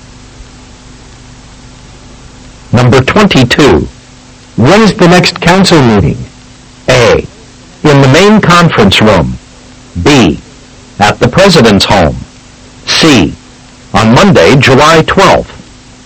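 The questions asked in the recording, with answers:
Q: When is the next council meeting?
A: C: On Monday, July 12th.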